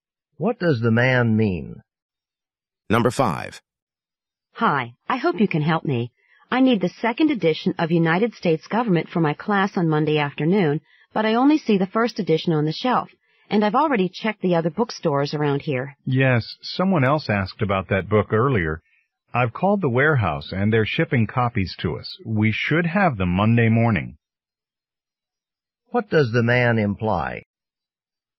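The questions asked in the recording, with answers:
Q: What does the man imply?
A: The woman can get the second edition on Monday morning, before her class.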